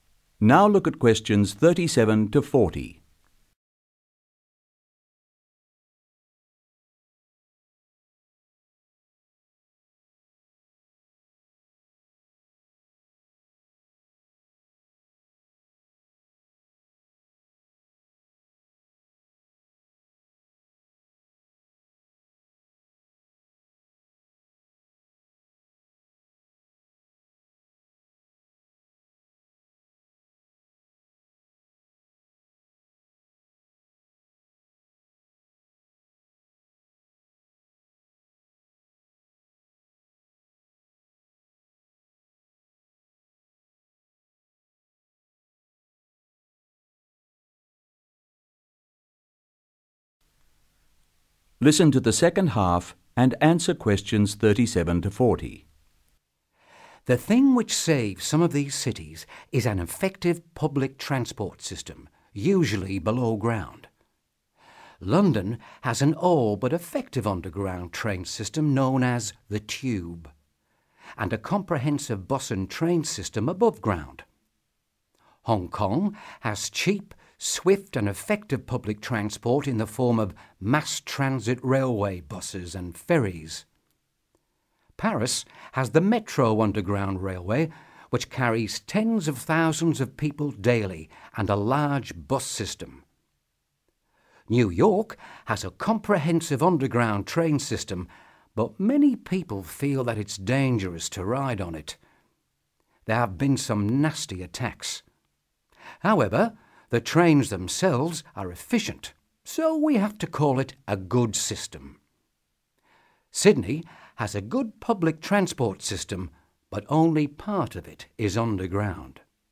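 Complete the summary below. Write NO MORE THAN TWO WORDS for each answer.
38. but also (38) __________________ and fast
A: cheap

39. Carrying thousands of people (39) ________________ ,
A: daily

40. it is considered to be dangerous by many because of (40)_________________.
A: nasty attacks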